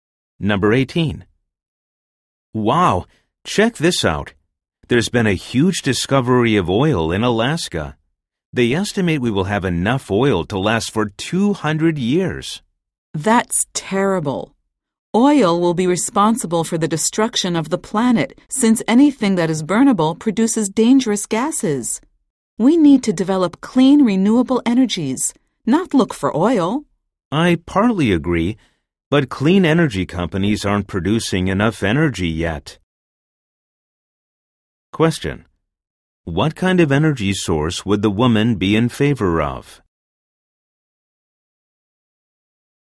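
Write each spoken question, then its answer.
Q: What kind of energy source would the woman be in favor of?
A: Clean, renewable energy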